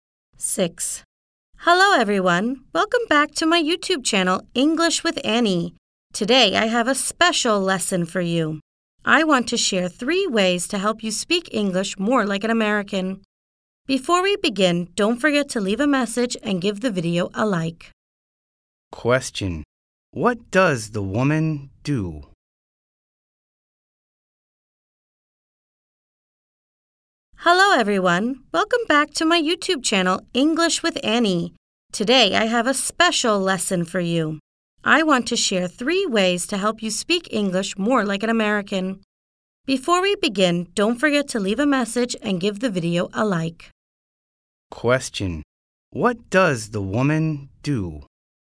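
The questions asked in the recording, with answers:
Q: What does the woman do?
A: She's a YouTuber who teaches English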